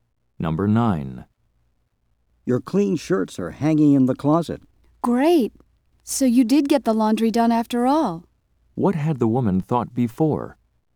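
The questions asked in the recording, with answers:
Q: What had the woman thought before?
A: That the laundry had not been done.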